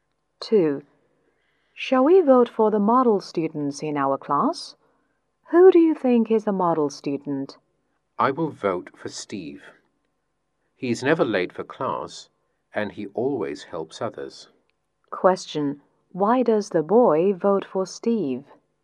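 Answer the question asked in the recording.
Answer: He's never late for class and always helps others.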